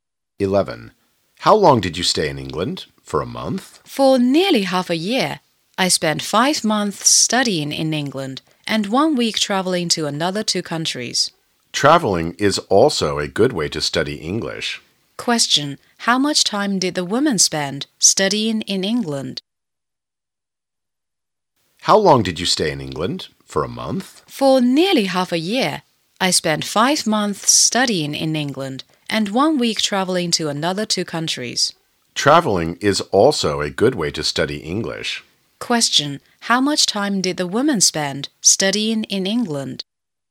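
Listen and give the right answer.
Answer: 5 months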